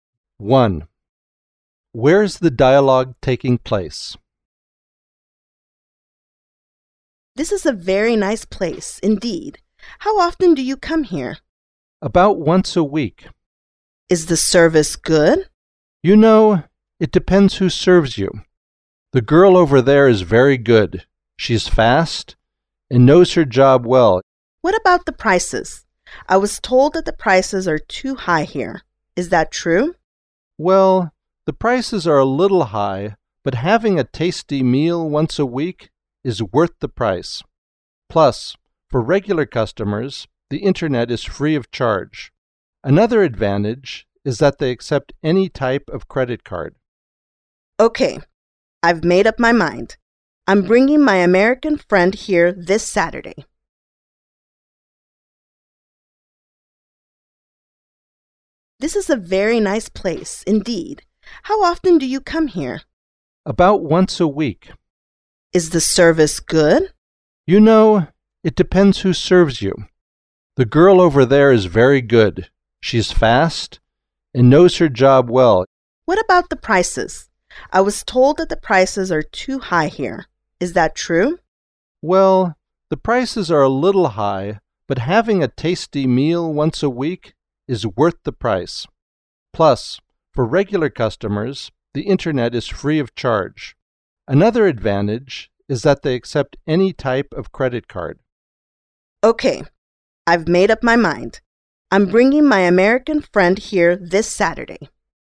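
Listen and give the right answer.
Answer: In a restaurant (café)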